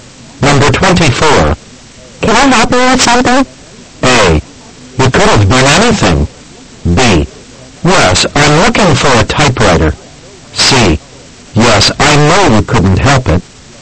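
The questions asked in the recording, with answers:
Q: Can I help you with something?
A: B: Yes, I'm looking for a typewriter.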